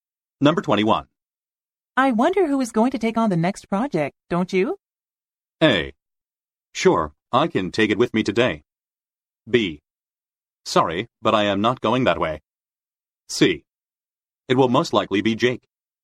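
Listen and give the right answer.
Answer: C: It will most likely be Jake.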